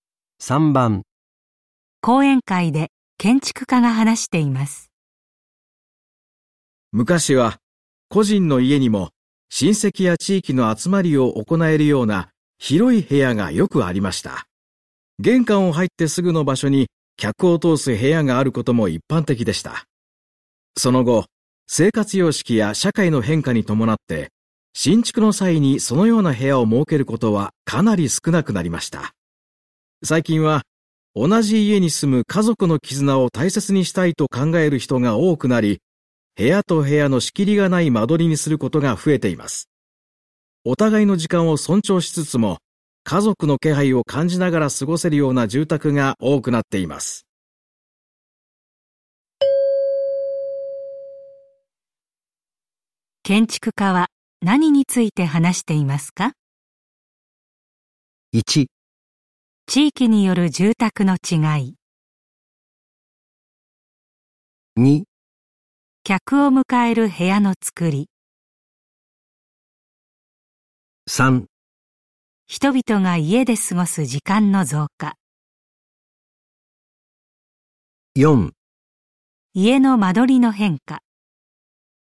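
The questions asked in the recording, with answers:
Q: 建築家は何について話していますか?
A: 4: 家の間取りの変化。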